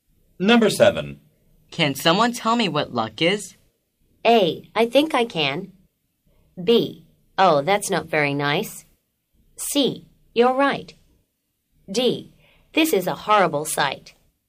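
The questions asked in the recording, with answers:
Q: Can someone tell me what luck is?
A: A: I think I can.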